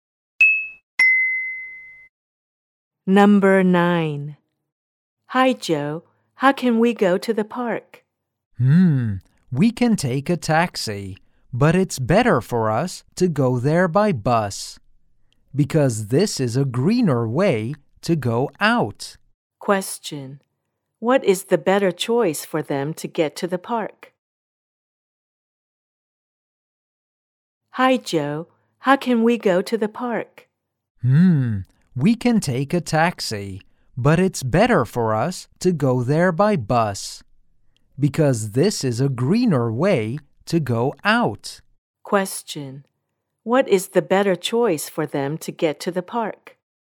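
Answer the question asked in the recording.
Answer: By bus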